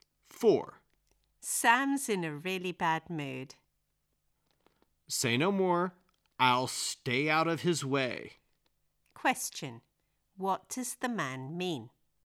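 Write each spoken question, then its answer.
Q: What does the man mean?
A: He will avoid Sam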